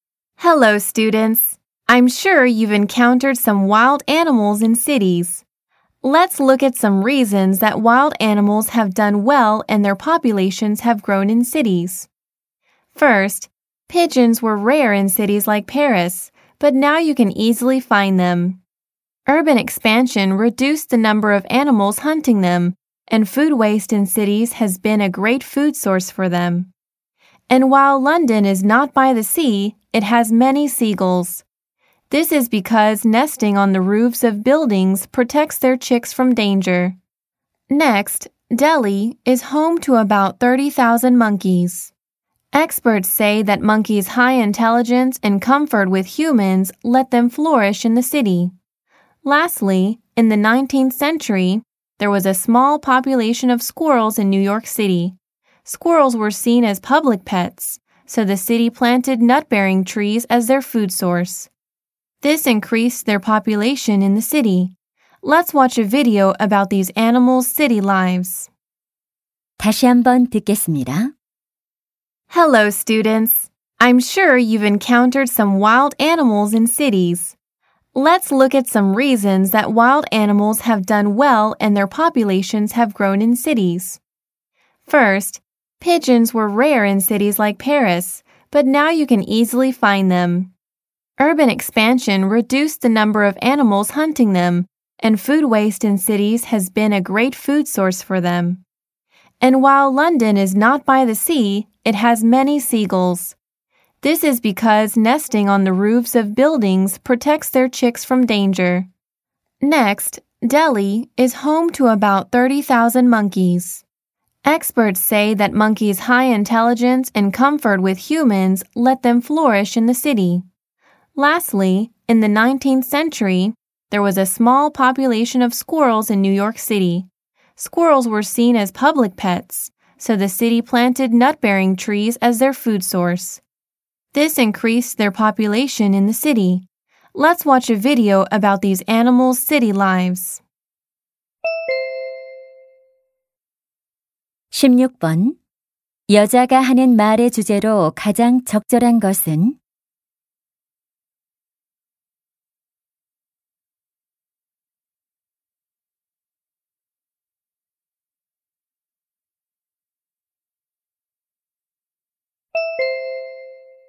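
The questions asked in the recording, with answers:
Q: 여자가 하는 말의 주제로 가장 적절한 것은?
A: 야생 동물들이 도시에서 번성하게 된 이유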